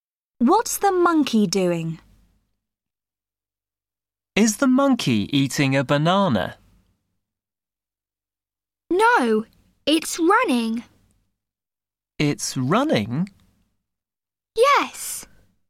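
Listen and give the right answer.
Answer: It's running.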